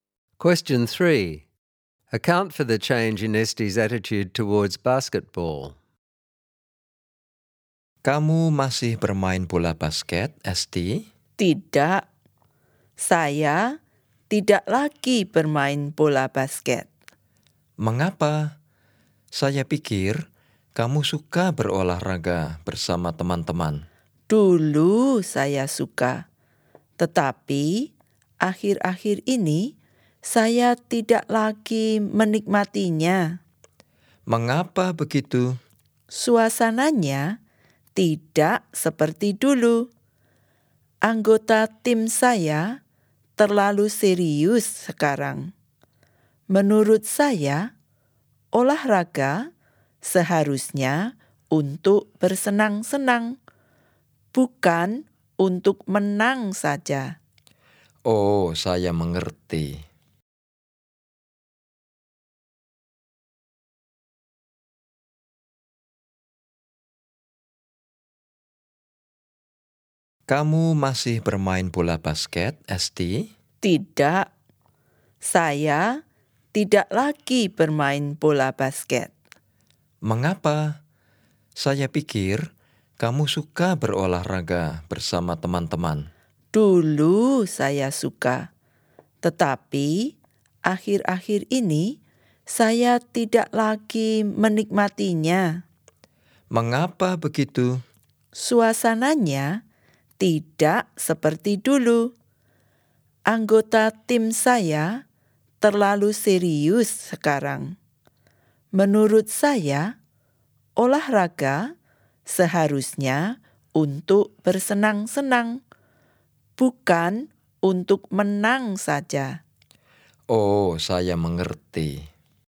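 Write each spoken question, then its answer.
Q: Account for the change in Esti's attitude towards basketball.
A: She used to enjoy it, but the atmosphere has changed: her teammates are too serious now, and she thinks sport should be for fun, not just winning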